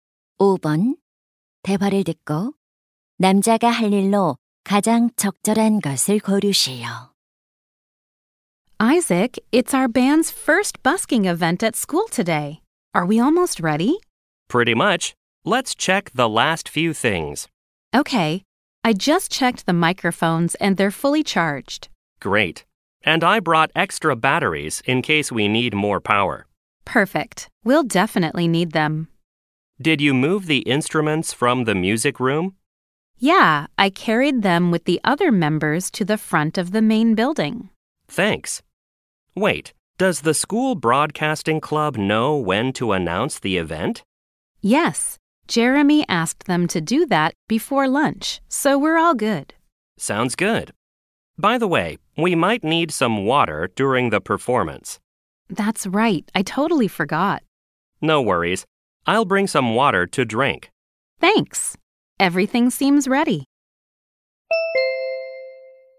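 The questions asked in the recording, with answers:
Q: 대화를 듣고 남자가 할 일로 가장 적절한 것을 고르시오.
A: 마실 물 가져오기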